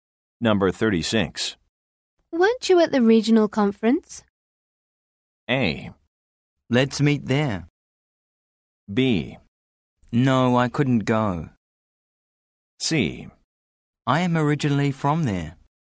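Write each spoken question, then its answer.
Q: Weren't you at the regional conference?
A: B: No, I couldn't go.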